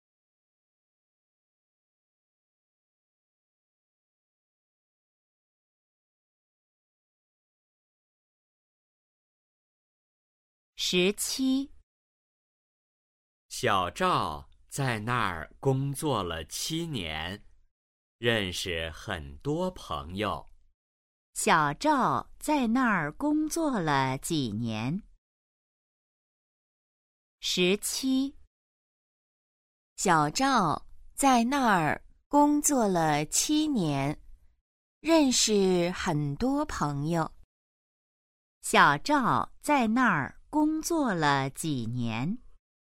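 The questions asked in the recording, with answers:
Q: 小赵在那儿工作了几年?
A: 七年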